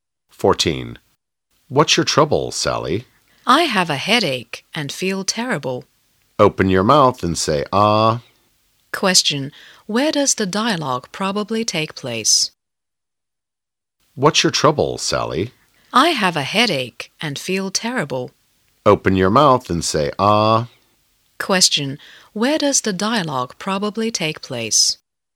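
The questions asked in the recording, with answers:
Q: Question. Where does the dialogue probably take place?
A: In a hospital.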